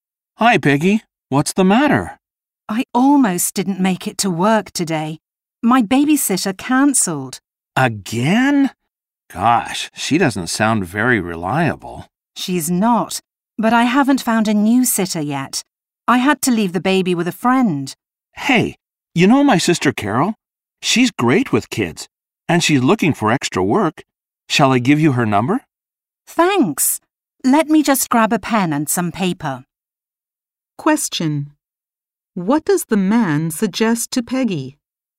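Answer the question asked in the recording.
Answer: That she call his sister Carol, who could babysit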